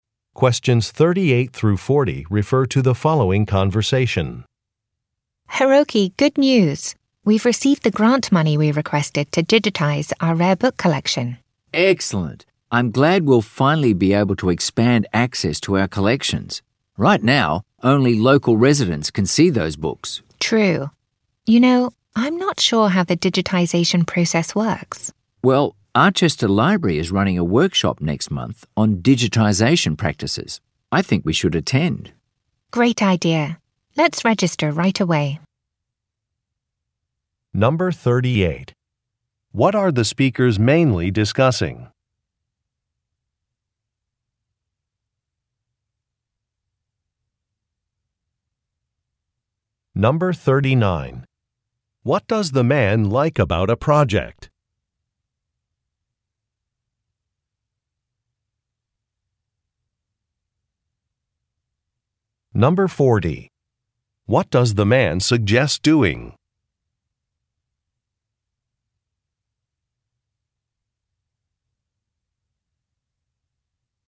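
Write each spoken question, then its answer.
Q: What are the speakers mainly discussing?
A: A grant they received to digitize their rare book collection

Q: What does the man like about a project?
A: It will expand access to the collections beyond local residents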